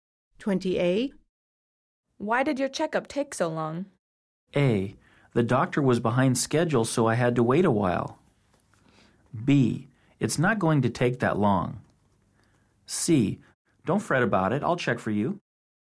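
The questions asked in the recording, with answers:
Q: Why did your checkup take so long?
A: A: The doctor was behind schedule, so I had to wait a while.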